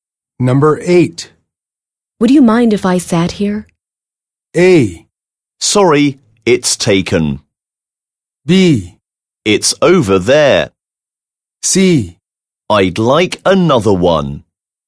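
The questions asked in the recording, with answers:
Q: Would you mind if I sat here?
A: A: Sorry, it's taken.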